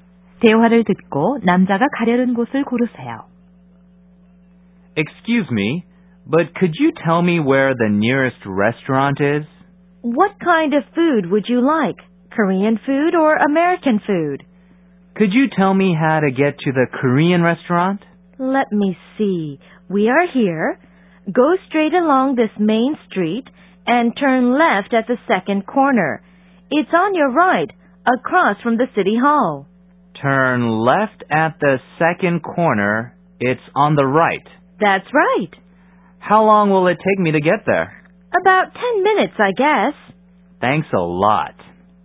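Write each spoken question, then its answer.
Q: 대화를 듣고 남자가 가려는 곳을 고르세요.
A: 한식당 (시청 맞은편)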